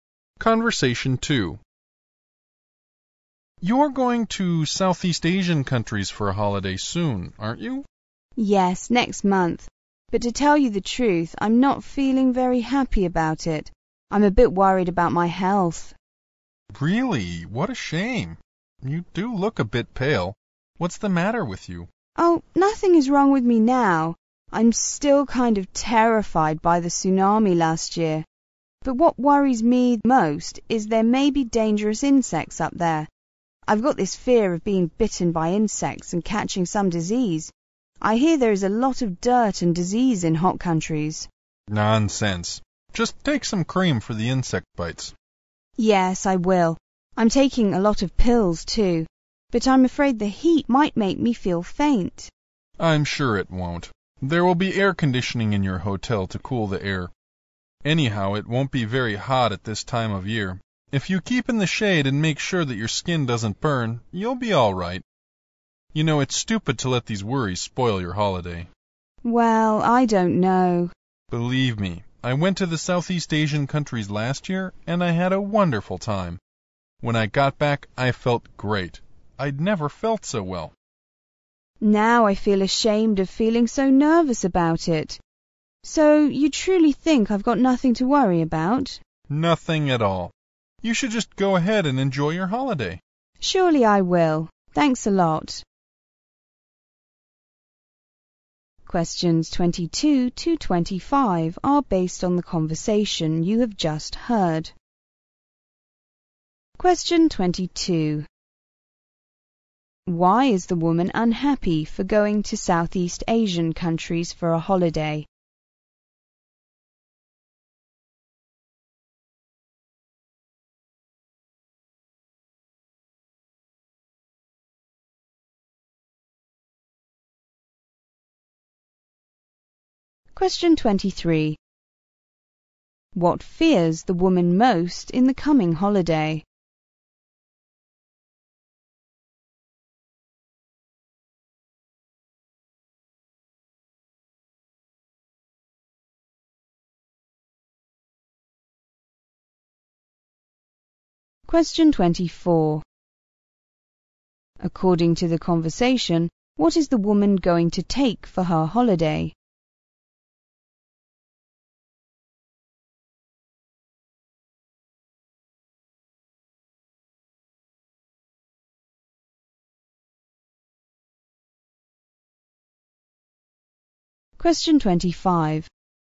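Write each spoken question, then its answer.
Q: Why is the woman unhappy for going to Southeast Asian countries for a holiday?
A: She is worried about her health

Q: What fears the woman most in the coming holiday?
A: Being bitten by insects and catching a disease

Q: According to the conversation, what is the woman going to take for her holiday?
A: Cream for insect bites and a lot of pills

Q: At the end of the conversation, what is the woman's idea about her trip plan?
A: She will go ahead and enjoy the holiday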